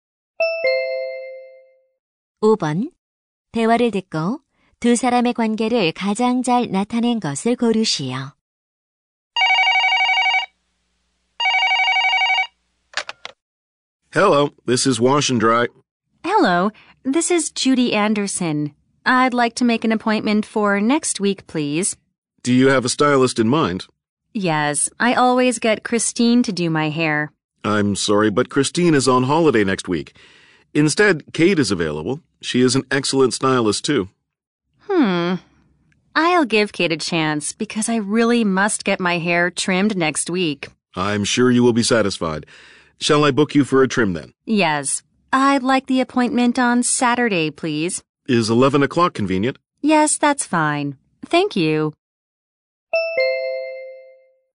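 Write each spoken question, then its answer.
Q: 대화를 듣고 두 사람의 관계를 가장 잘 나타낸 것을 고르시오.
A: 미용실 직원 – 손님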